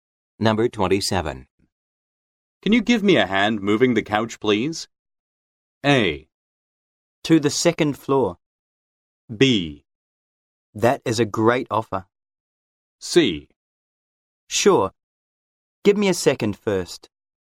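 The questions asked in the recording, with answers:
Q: Can you give me a hand moving the couch, please?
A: C: Sure. Give me a second first.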